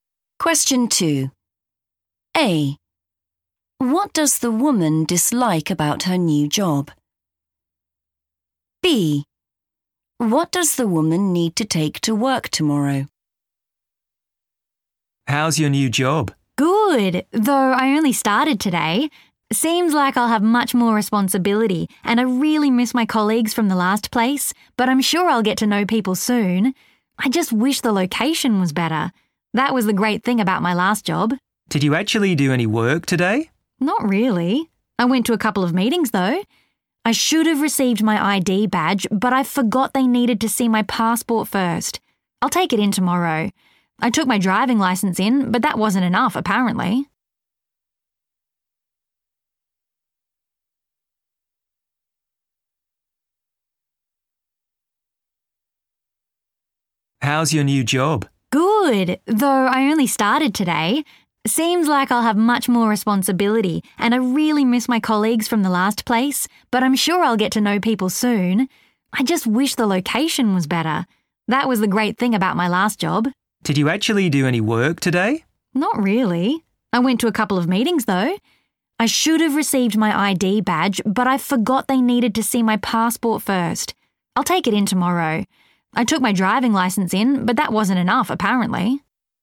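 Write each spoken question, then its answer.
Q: What does the woman dislike about her new job?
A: the location

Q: What does the woman need to take to work tomorrow?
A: her passport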